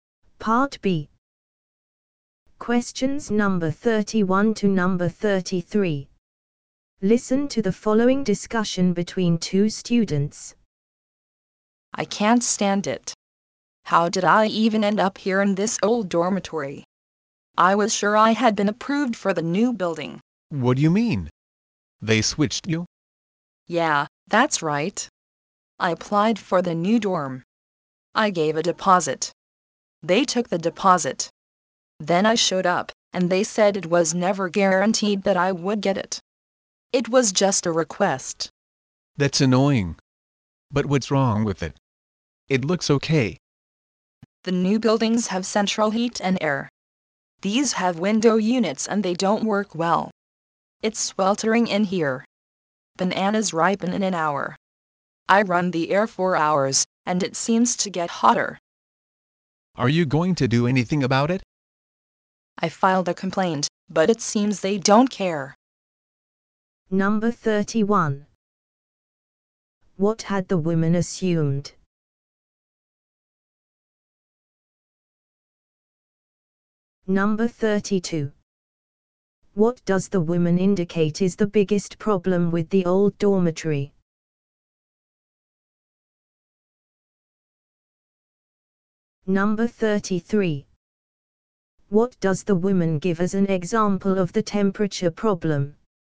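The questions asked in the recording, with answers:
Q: What had the woman assumed?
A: That she had been approved for the new dorm building.

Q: What does the woman indicate is the biggest problem with the old dormitory?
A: It is too hot; the window air units don't work well.

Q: What does the woman give as an example of the temperature problem?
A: Bananas ripen in an hour.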